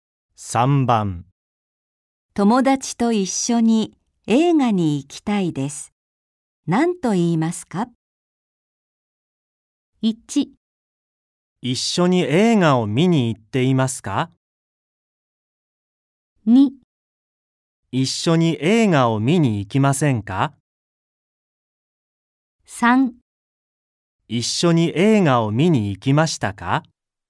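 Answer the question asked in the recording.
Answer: 2: 一緒に映画を見に行きませんか?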